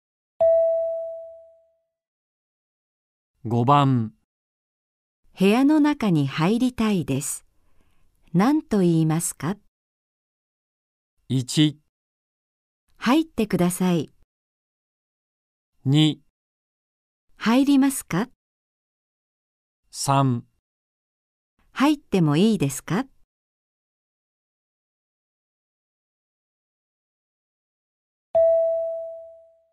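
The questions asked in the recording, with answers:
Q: 部屋の中に入りたいです。何と言いますか?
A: 3: 入ってもいいですか。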